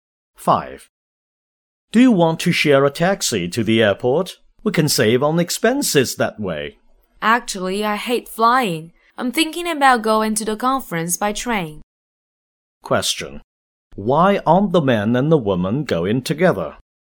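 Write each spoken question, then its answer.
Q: Why aren't the man and the woman going together?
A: One of them hates flying and will go to the conference by train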